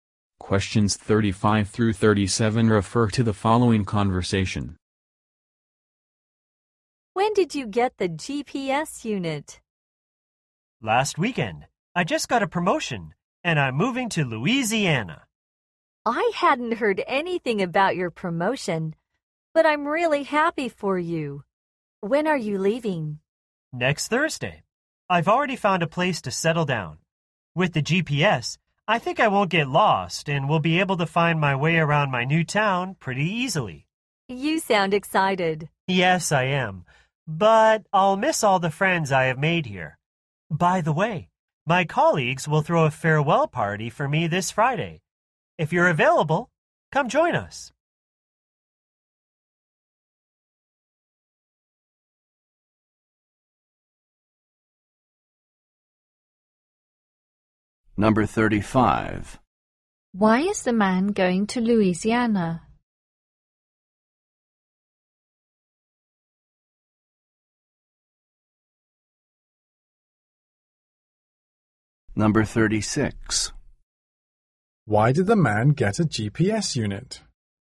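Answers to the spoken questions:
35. He got a promotion
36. To find his way around his new town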